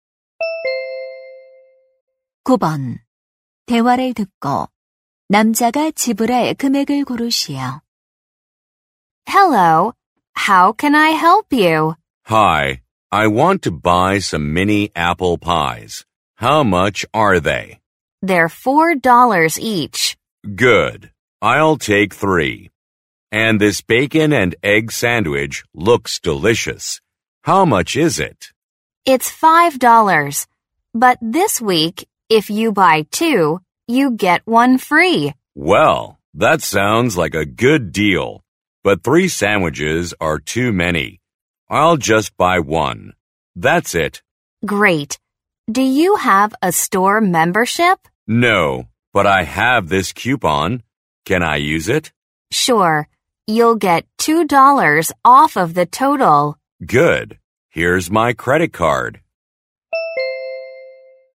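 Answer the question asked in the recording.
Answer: $15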